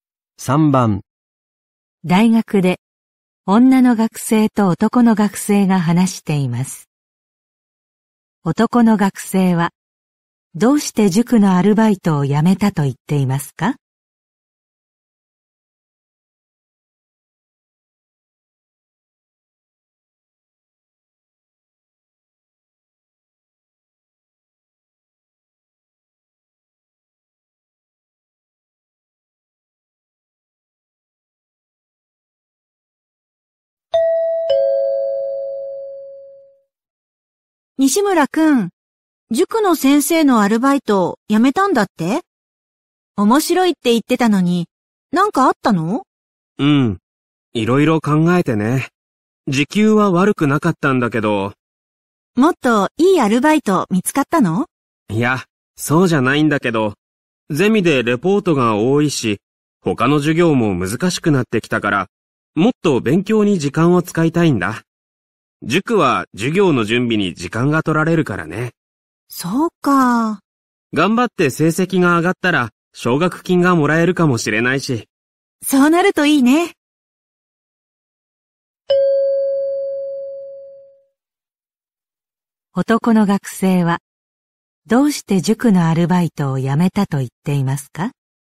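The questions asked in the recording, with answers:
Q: 男の学生はどうして塾のアルバイトを辞めたと言っていますか?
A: もっと勉強に時間を使いたいから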